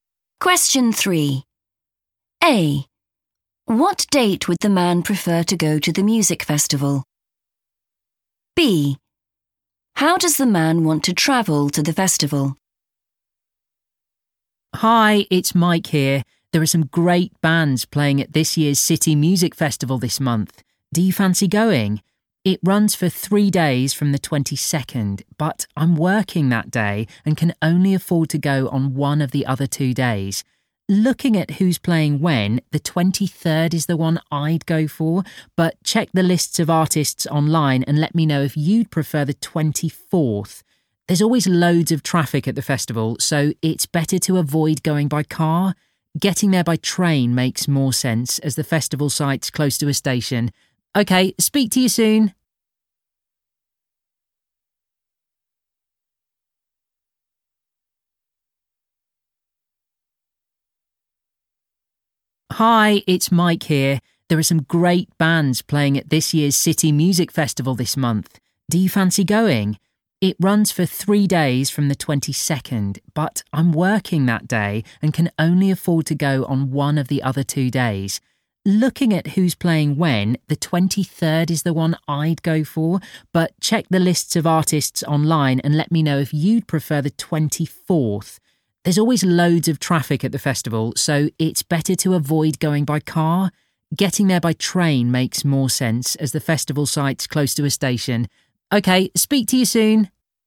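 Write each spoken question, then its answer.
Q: What date would the man prefer to go to the music festival?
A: the 23rd

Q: How does the man want to travel to the festival?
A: by train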